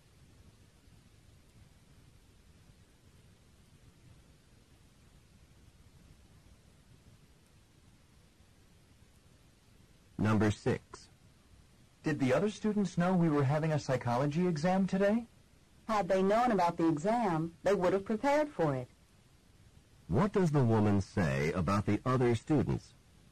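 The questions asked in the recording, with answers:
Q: What does the woman say about the other students?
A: They did not know about the exam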